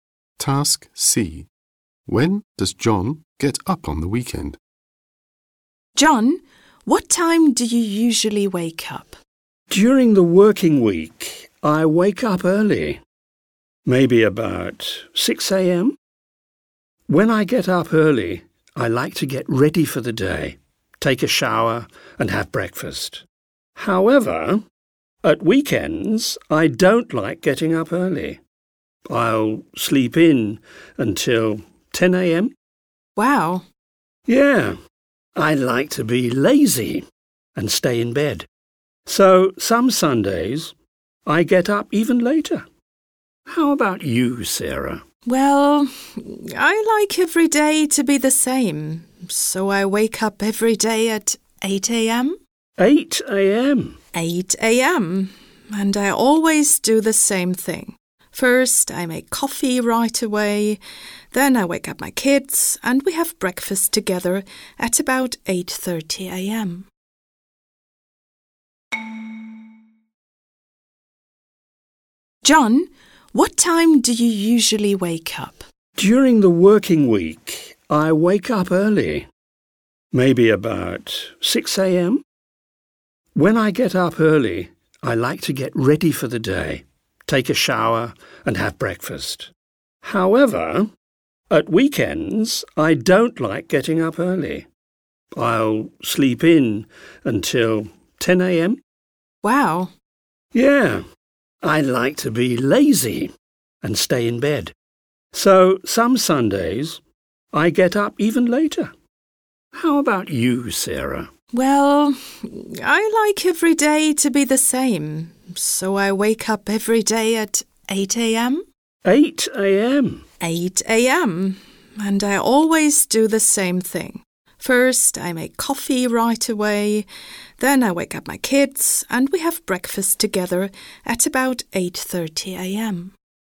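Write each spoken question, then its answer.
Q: When does John get up on the weekend?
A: At 10 a.m. (sometimes later on Sundays)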